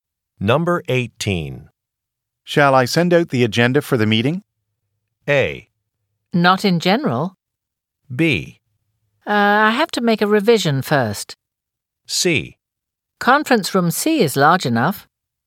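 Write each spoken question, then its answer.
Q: Shall I send out the agenda for the meeting?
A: B: I have to make a revision first.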